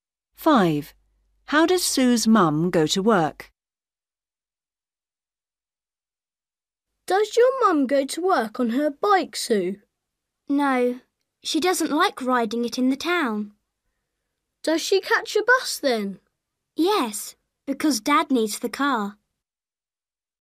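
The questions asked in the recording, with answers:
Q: How does Sue's mum go to work?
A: By bus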